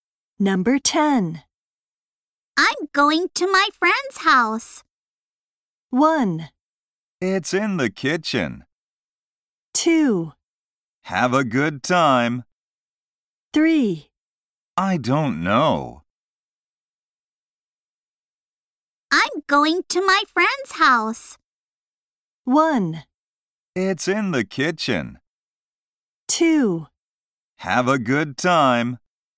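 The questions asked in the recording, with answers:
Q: I'm going to my friend's house.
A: 2: Have a good time.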